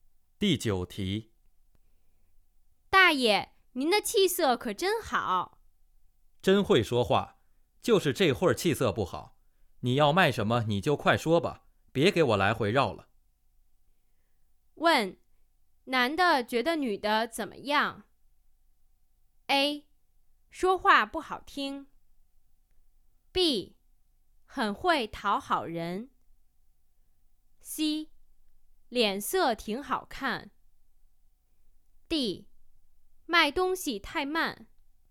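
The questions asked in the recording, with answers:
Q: 问,男的觉得女的怎么样?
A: B: 很会讨好人。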